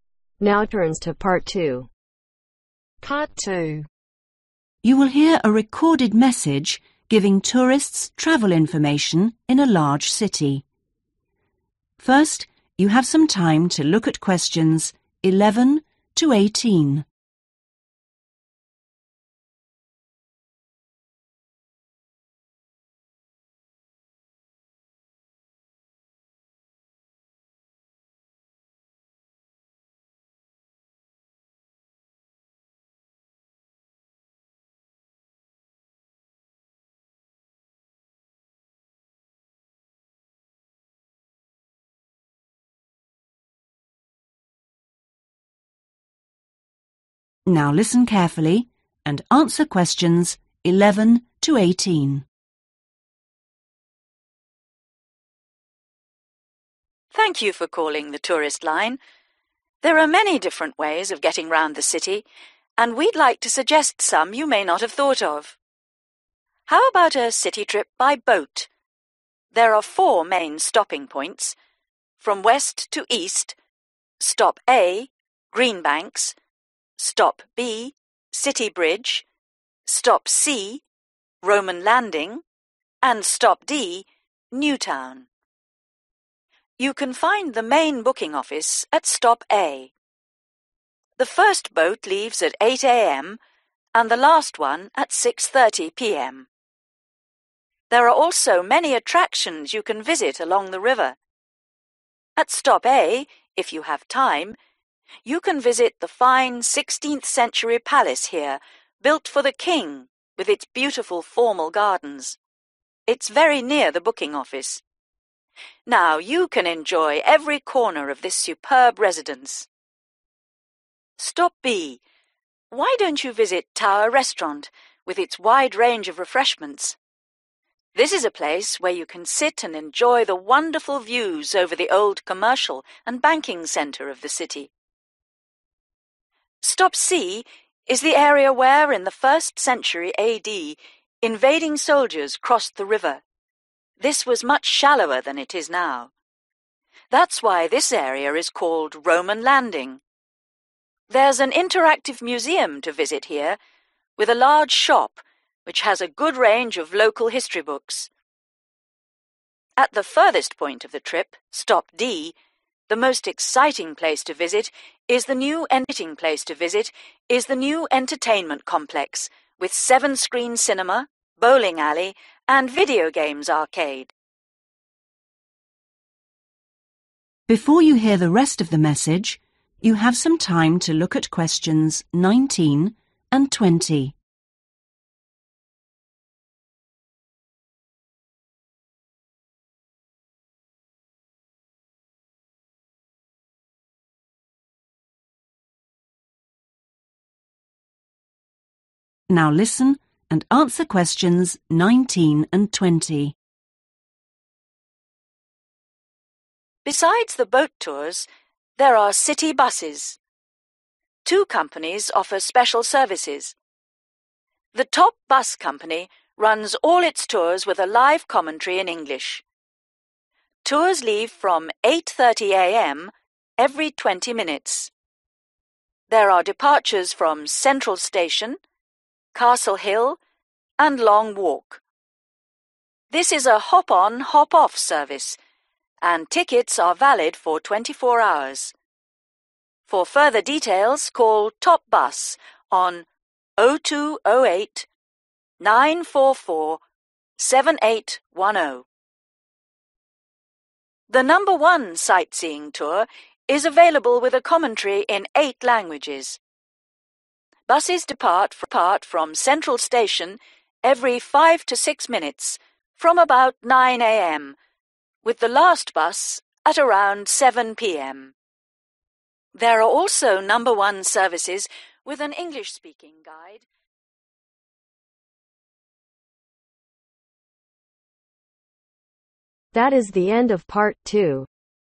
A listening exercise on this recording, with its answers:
Write NO MORE THAN ONE WORD AND/OR A NUMBER for each answer.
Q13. Last boat; (13)............ p.m.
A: 6.30

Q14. has lovely (14)............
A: (formal) garden

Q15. (15)............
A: (tower) restaurant

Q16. has good (16)............ of city centre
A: view(s)

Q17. bookshop specializing in the (17)............ of the local area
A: history

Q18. (18)............ cinema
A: 7 screen

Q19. How often do the Top Bus Company tours run ?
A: every 20 minutes

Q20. Where can you catch a Number One Sightseeing Tour from ?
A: (from/the) central Station